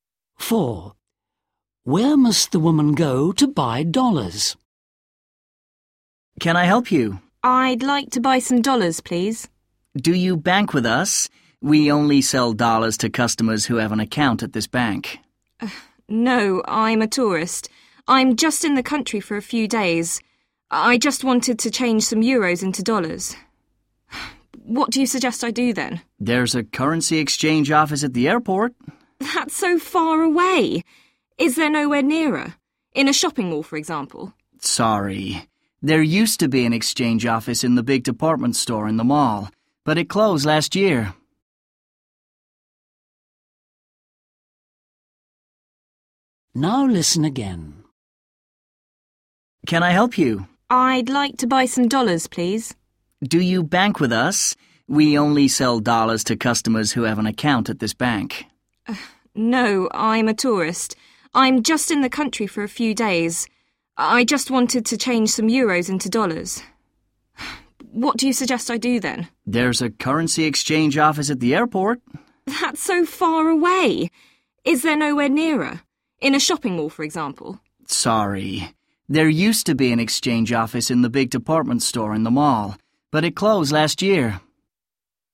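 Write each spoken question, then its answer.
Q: Where must the woman go to buy dollars?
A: the currency exchange office at the airport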